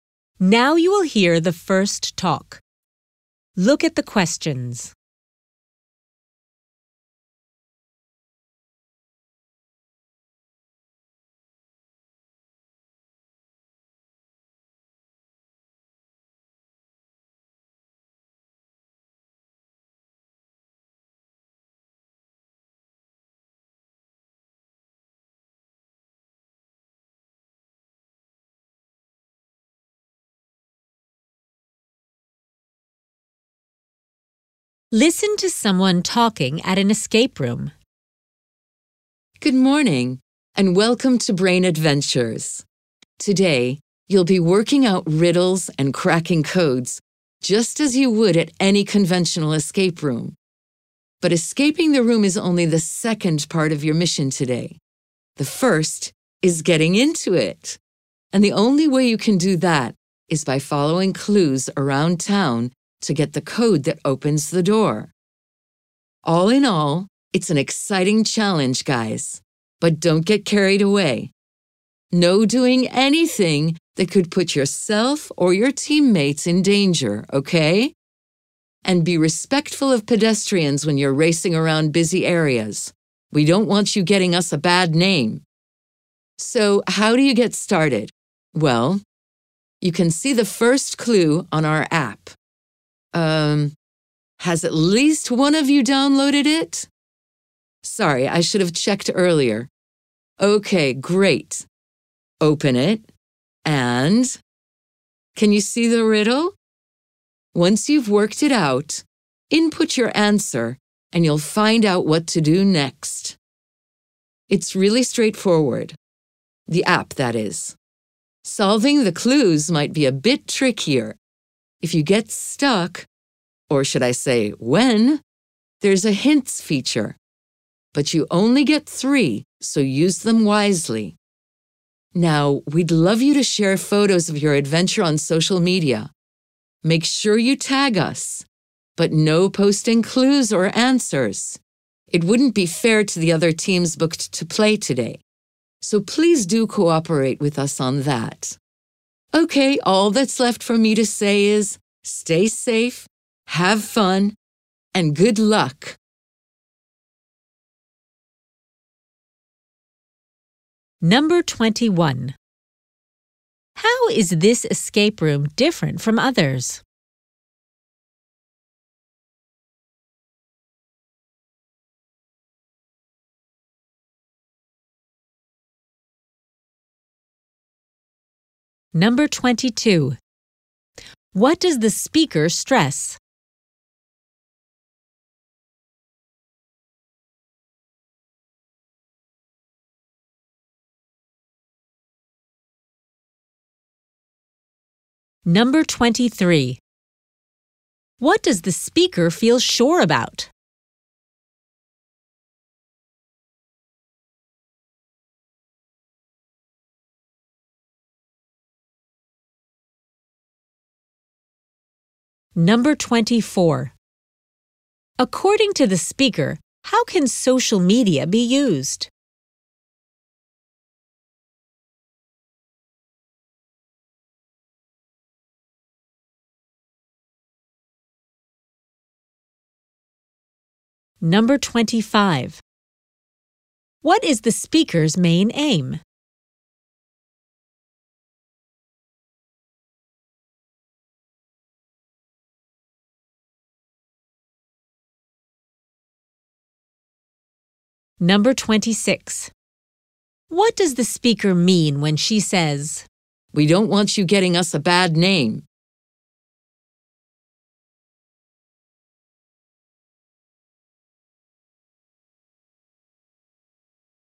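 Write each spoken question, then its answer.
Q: How is this escape room different from others?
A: Players must first follow clues around town to get the code that opens the door.

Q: What does the speaker stress?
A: Safety: do nothing that puts yourselves or teammates in danger, and respect pedestrians.

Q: According to the speaker, how can social media be used?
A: To share photos of the adventure, tagging the company, without posting clues or answers.

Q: What does the speaker mean when she says, "We don't want you getting us a bad name"?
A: Players' bad behaviour in public could damage the company's reputation.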